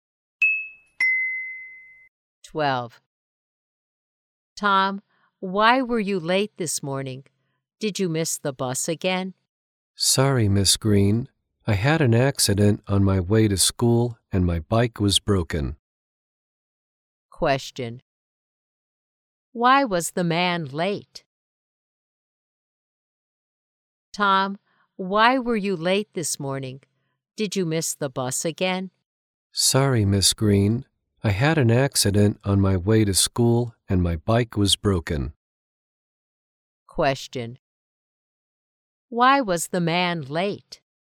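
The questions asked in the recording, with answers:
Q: Why was the man late?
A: He had an accident and his bike was broken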